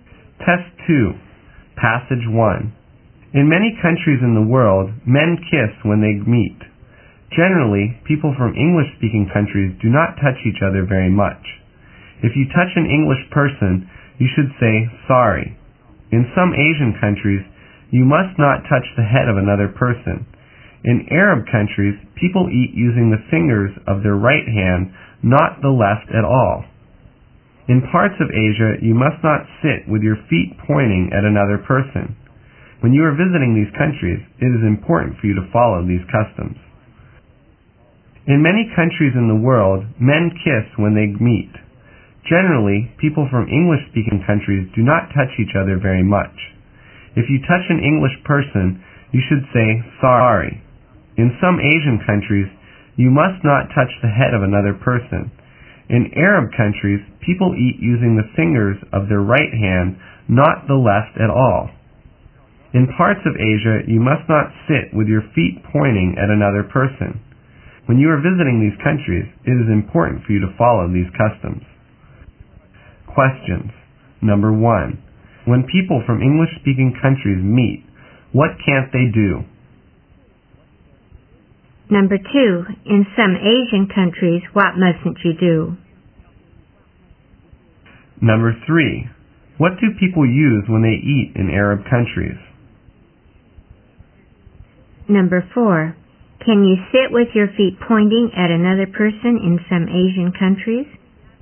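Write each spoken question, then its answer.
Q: In some Asian countries, what mustn't you do?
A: Touch the head of another person.

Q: What do people use when they eat in Arab countries?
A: The fingers of their right hand.

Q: Can you sit with your feet pointing at another person in some Asian countries?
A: No, you can't.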